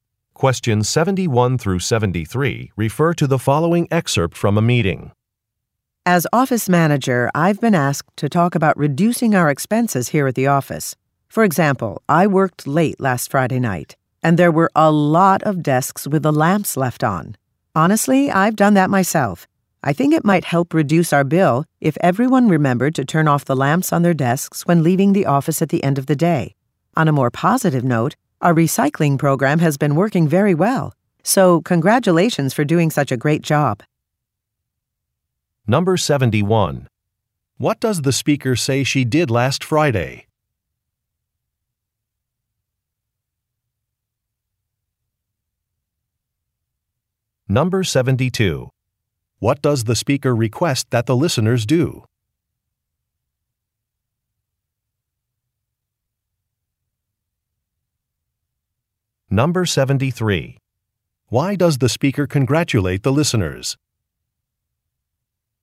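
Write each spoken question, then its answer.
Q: What does the speaker say she did last Friday?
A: She worked late

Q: What does the speaker request that the listeners do?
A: Turn off their desk lamps when leaving

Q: Why does the speaker congratulate the listeners?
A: The recycling program has worked very well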